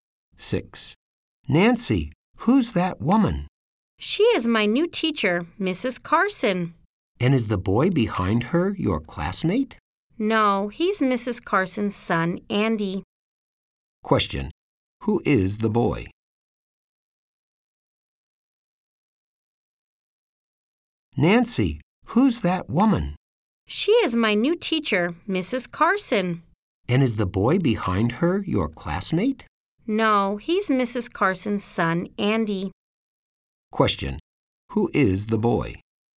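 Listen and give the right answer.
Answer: Mrs. Carson's son, Andy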